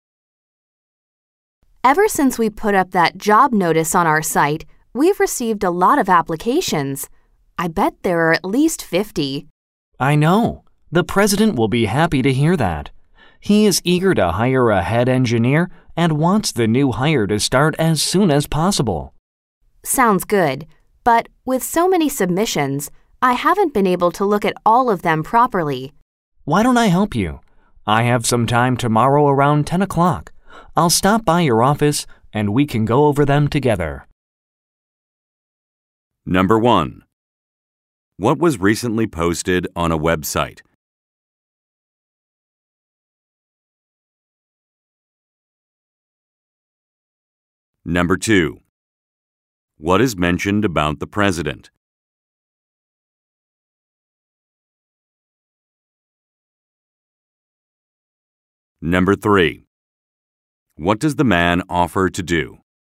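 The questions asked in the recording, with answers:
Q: What was recently posted on a website?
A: A job notice

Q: What is mentioned about the president?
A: He is eager to hire a head engineer who can start as soon as possible

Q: What does the man offer to do?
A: Help go over the applications together tomorrow around 10 o'clock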